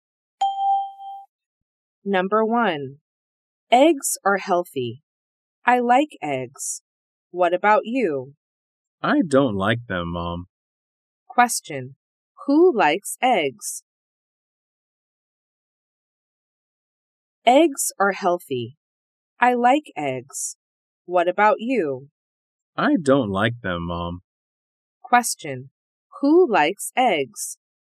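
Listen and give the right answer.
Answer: Mom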